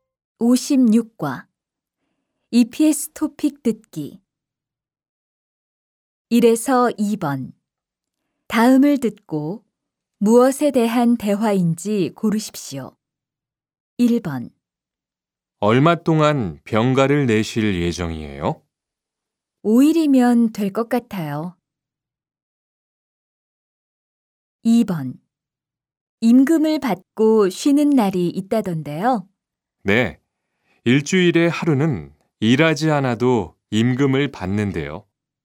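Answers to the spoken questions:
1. 병가
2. 유급 휴일(주휴일)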